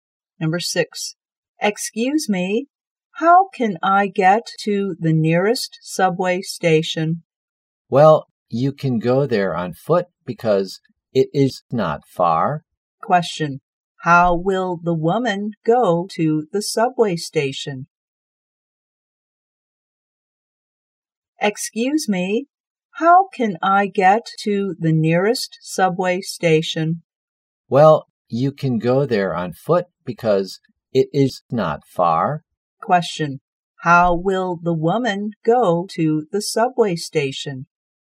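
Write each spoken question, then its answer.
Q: Question, how will the woman go to the subway station?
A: On foot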